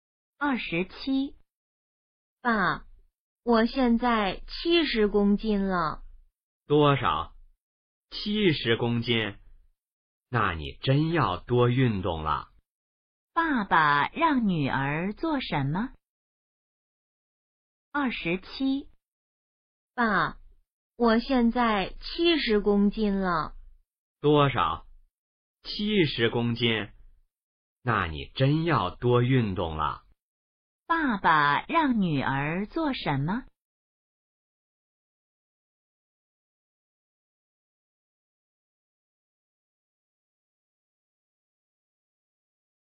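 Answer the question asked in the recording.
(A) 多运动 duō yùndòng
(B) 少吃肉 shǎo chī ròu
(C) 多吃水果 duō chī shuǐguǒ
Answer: (A) 多运动 duō yùndòng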